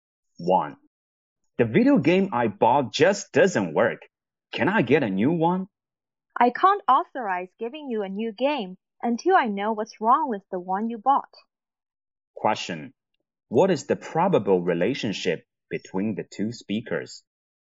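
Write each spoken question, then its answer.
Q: What is the probable relationship between the two speakers?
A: Customer and shop assistant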